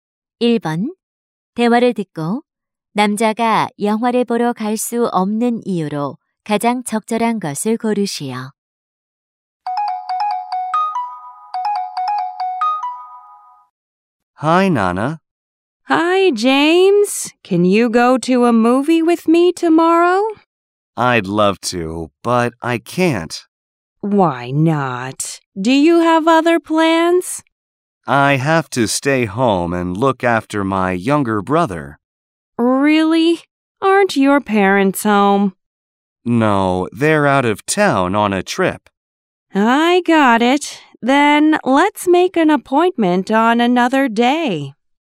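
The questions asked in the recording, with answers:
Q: 대화를 듣고 남자가 영화를 보러 갈 수 없는 이유로 가장 적절한 것을 고르시오.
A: 집에서 남동생을 돌봐야 해서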